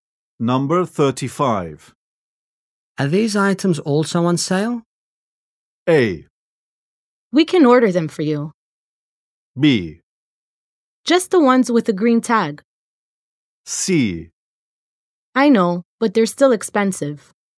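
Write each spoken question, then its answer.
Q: Are these items also on sale?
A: B: Just the ones with the green tag.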